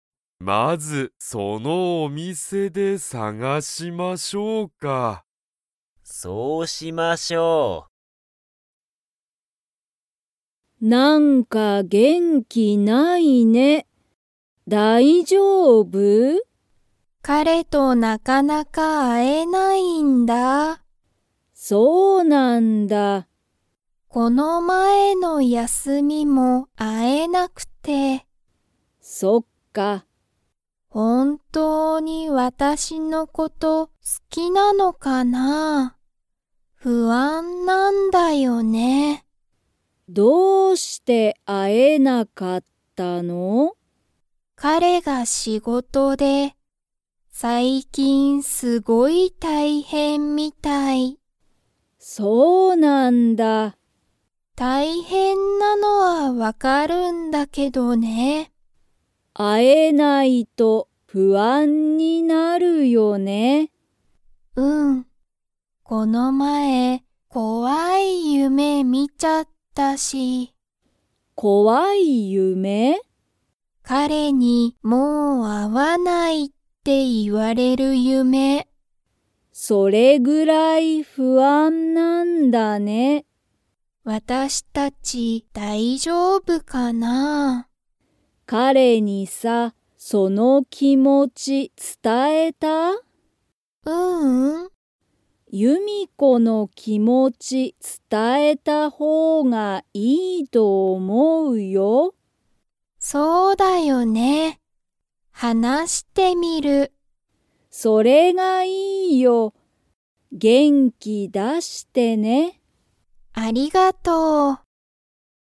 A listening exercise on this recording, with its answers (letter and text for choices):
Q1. ゆみこは、彼かれとよく会あえていますか?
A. はい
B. いいえ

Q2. ゆみこはこの前まえ、 を見みた。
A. 新あたらしいお店みせ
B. 面白おもしろい映画えいが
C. 楽たのしい夢ゆめ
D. 怖こわい夢ゆめ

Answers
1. B. いいえ
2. D. 怖こわい夢ゆめ

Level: Level 3